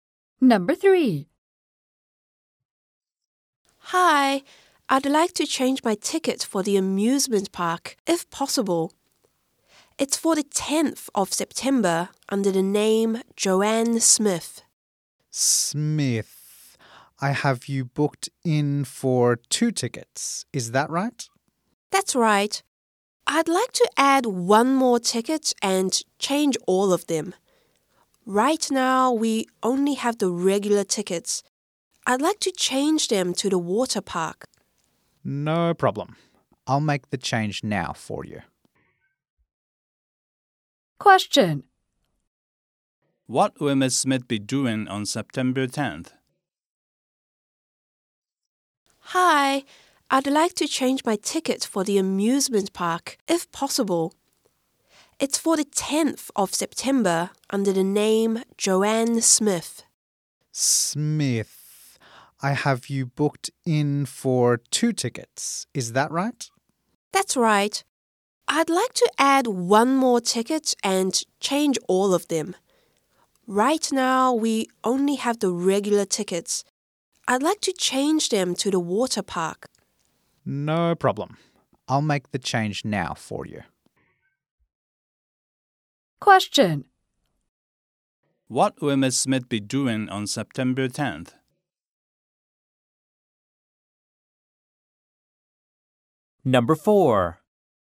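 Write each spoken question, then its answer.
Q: What will Ms. Smith be doing on September 10th?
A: Going to the water park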